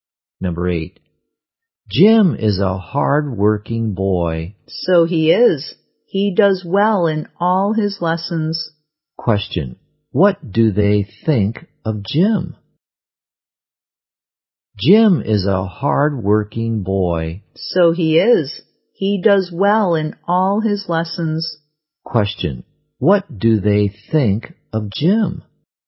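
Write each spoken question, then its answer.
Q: What do they think of Jim?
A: He is hard-working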